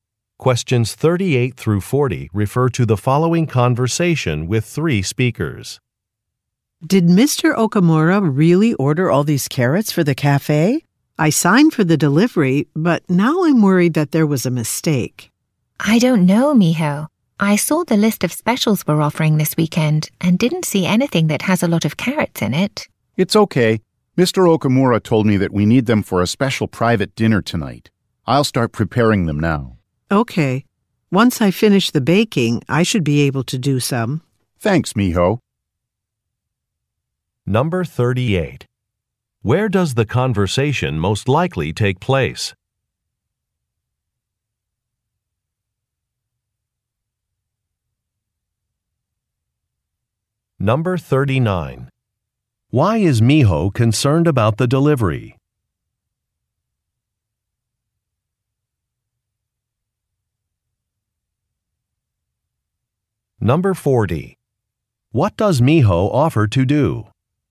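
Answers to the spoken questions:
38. In a cafe
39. She thinks too many carrots were ordered by mistake
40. Help prepare the carrots after baking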